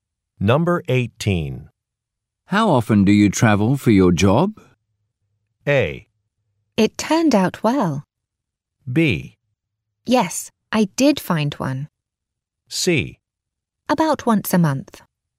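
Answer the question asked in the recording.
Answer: C: About once a month.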